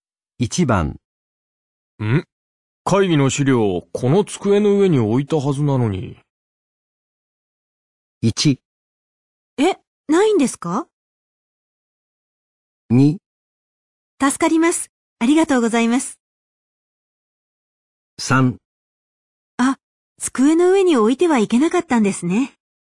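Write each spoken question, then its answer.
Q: ん?会議の資料、この机の上に置いたはずなのに。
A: 1: え、ないんですか?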